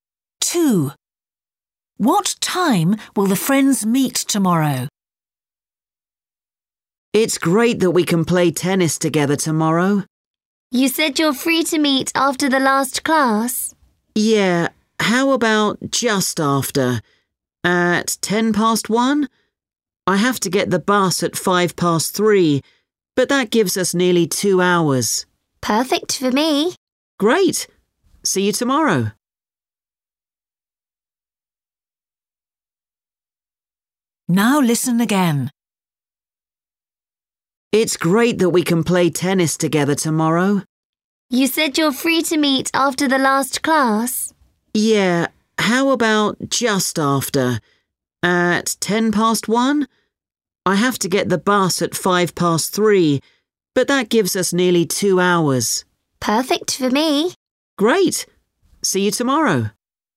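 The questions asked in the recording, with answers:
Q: What time will the friends meet tomorrow?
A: At 1:10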